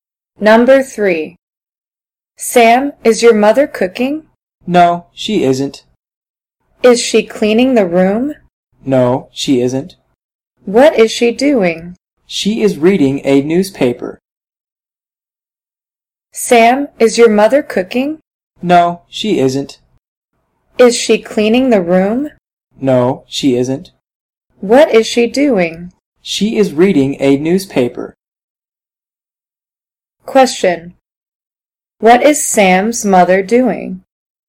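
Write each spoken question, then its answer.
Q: What is Sam's mother doing?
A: Reading a newspaper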